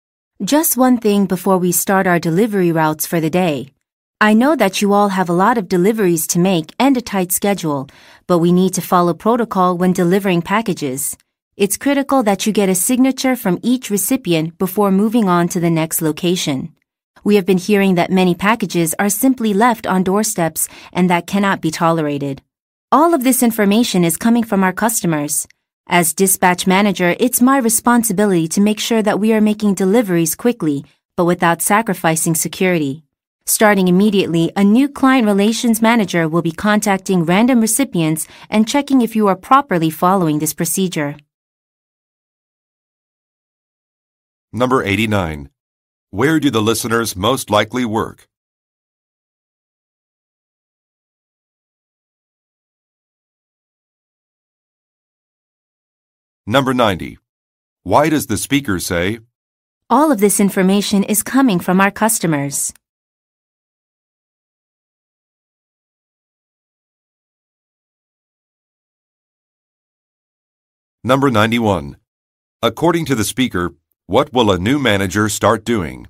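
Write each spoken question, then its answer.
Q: Where do the listeners most likely work?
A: At a package delivery company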